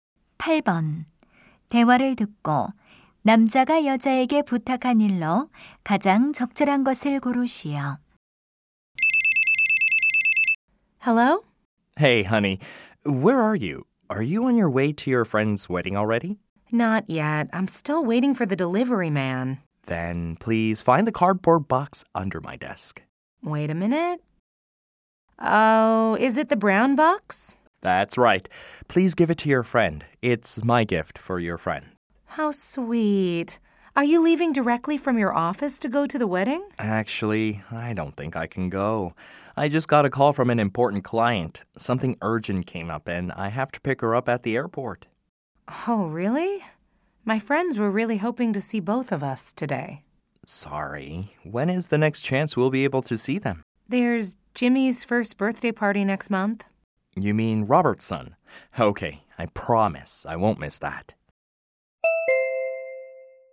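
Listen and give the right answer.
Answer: 책상 아래 상자(선물)를 친구에게 전해 주기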